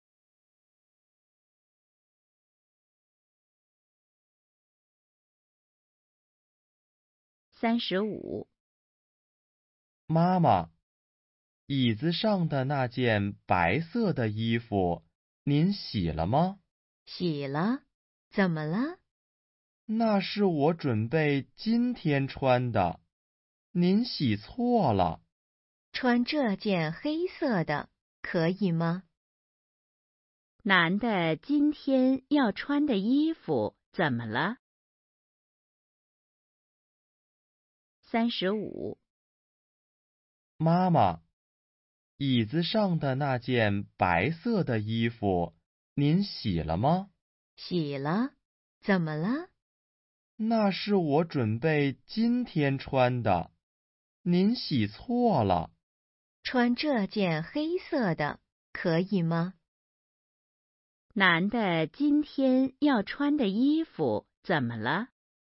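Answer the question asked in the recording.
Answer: 被妈妈洗了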